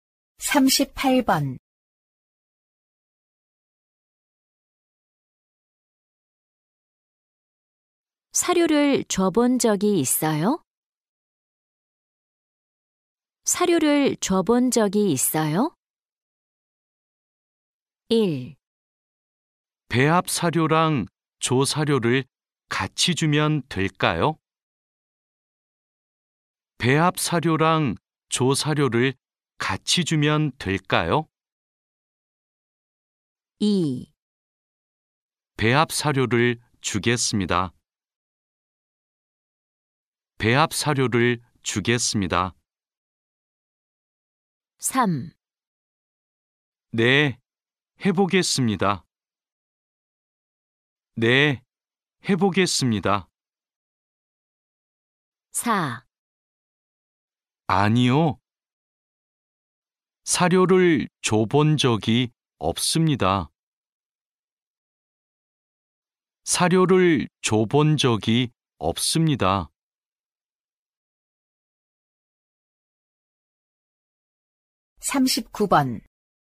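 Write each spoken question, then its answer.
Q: 사료를 줘본 적이 있어요?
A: 4: 아니요. 사료를 줘본 적이 없습니다.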